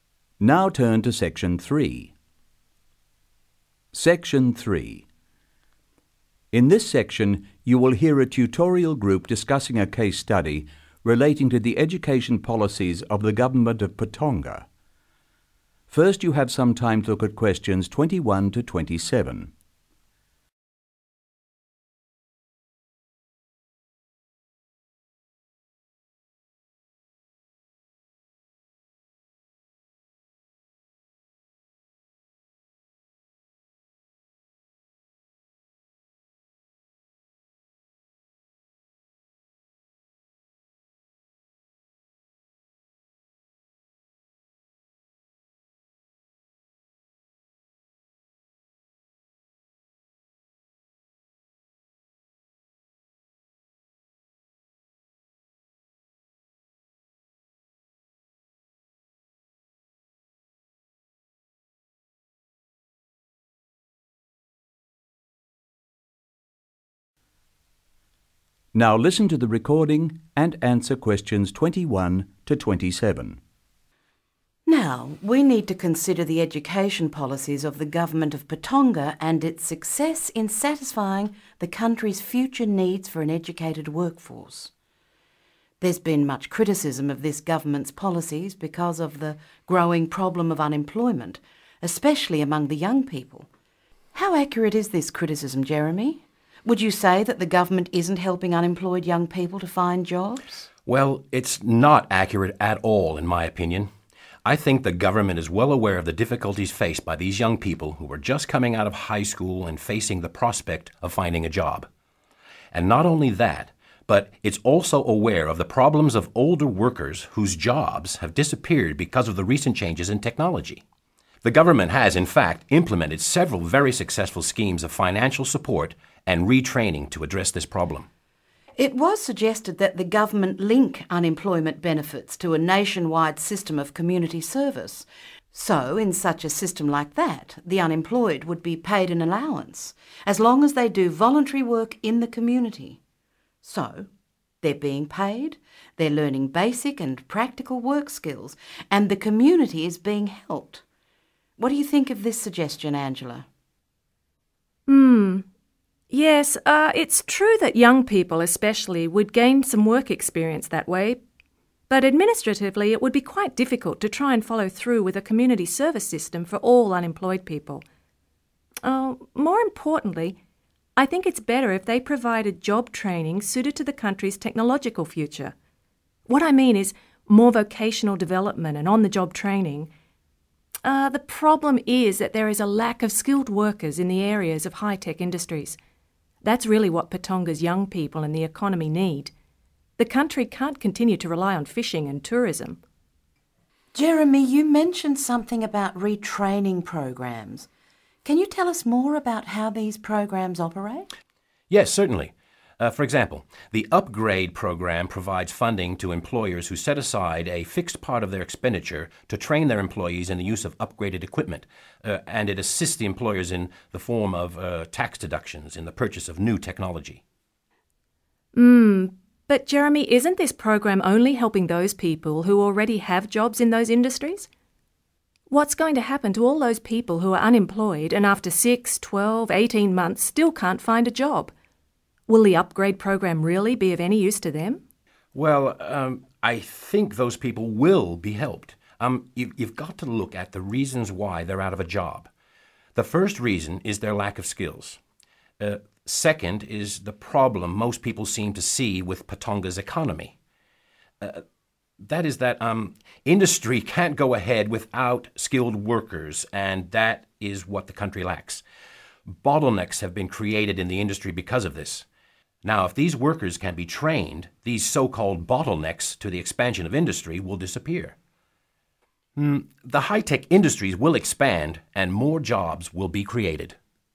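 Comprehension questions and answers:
Complete the notes below. Write NO MORE THAN THREE WORDS for each answer.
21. increasing (21) _______________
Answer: unemployment

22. affects (22) _______________and older workers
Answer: young people

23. jobs lost because of (23) _______________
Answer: changes in technology

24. allowance paid for (24) _______________work in the community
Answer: voluntary

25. need job training more suited to country's (25) _______________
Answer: technological future

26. funding for employee training in the use of (26) _______________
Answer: upgraded equipment

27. if successful, (27) _______________will disappear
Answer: bottlenecks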